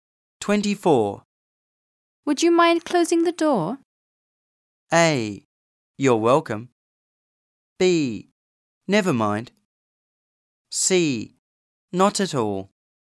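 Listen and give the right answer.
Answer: C: Not at all.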